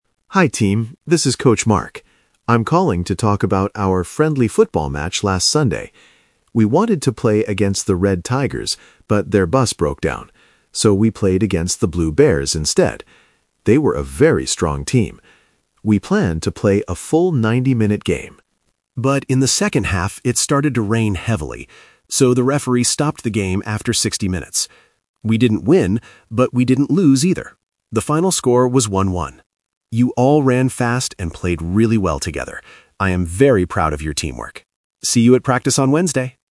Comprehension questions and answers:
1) Which team did Coach Mark's team play against on Sunday?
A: The Blue Bears.

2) Why was the football game stopped early?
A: Because it rained heavily.

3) How did Coach Mark feel about the team?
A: He was proud of their teamwork.

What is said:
Coach Mark: Hi team, this is Coach Mark. I'm calling to talk about our friendly football match last Sunday. We wanted to play against the Red Tigers, but their bus broke down. So, we played against the Blue Bears instead. They were a very strong team! We planned to play a full 90-minute game. But in the second half, it started to rain heavily. So, the referee stopped the game after 60 minutes. We didn't win, but we didn't lose either. The final score was 1-1. You all ran fast and played really well together. I am very proud of your teamwork. See you at practice on Wednesday!

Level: A2